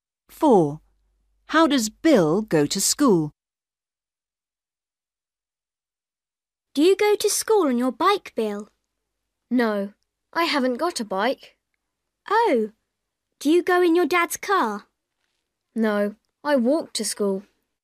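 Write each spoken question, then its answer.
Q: How does Bill go to school?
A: he walks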